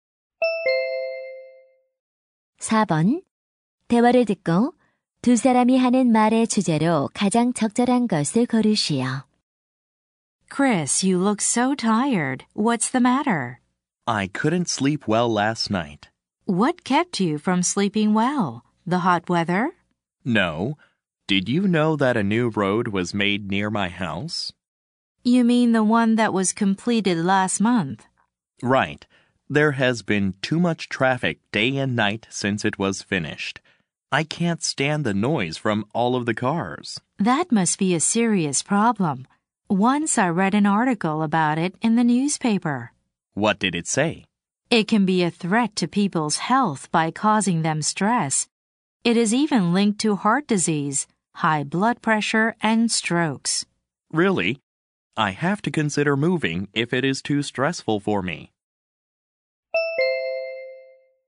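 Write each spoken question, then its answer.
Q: 대화를 듣고 두 사람이 하는 말의 주제로 가장 적절한 것을 고르시오.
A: 교통 소음이 건강에 미치는 악영향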